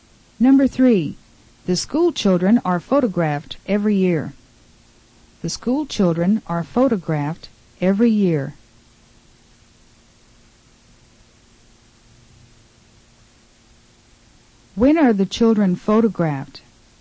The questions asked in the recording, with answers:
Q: When are the children photographed?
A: They are photographed every year.